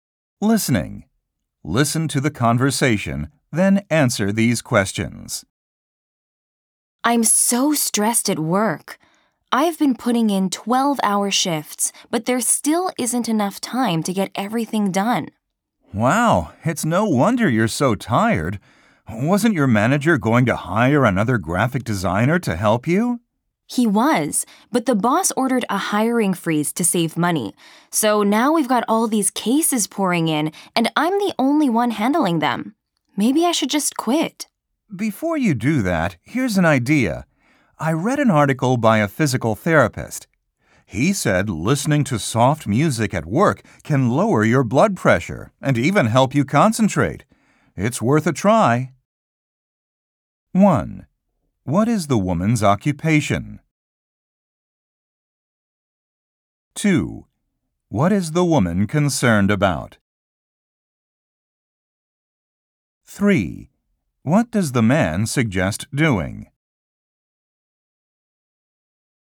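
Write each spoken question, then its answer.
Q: What is the woman's occupation?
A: Graphic designer

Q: What is the woman concerned about?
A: Having too much work and not enough time to get it done

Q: What does the man suggest doing?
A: Listening to soft music at work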